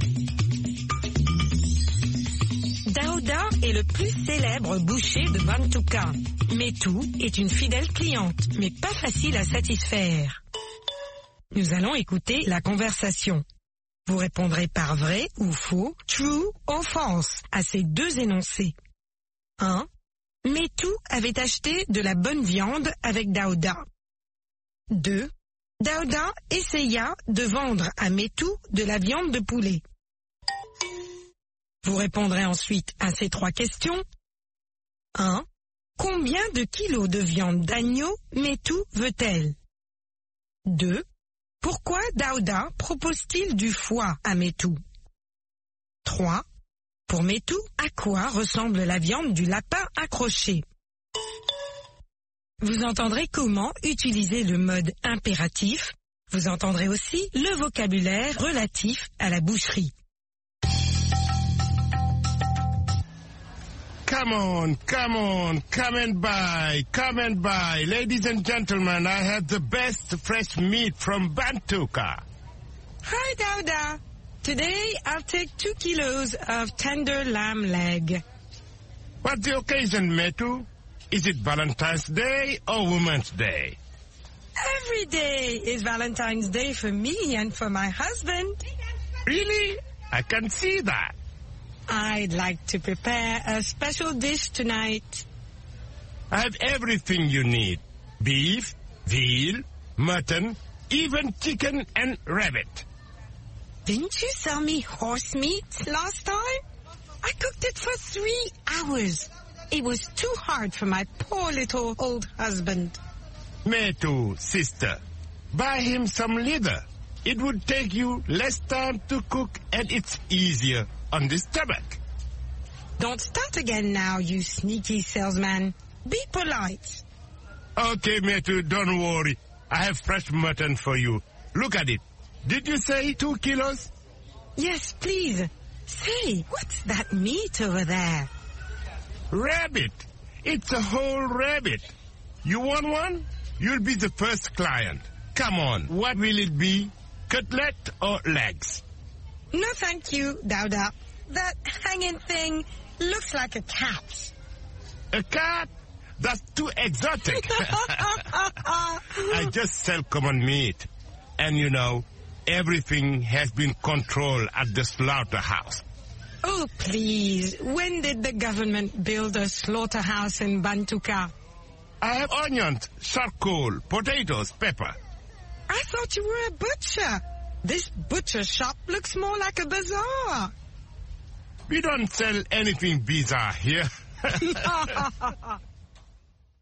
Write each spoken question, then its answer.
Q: Métou avait acheté de la bonne viande avec Daouda.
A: L'énoncé 1 est faux.

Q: Daouda essaya de vendre à Métou de la viande de poulet.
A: L'énoncé 2 est faux.

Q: Combien de kilos de viande d'agneau Métou veut-elle?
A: 2 kilos.

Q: Pourquoi Daouda propose-t-il du foie à Métou?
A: Ça prend moins de temps à cuire.

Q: Pour Métou, à quoi ressemble la viande du lapin accroché?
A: À un chat.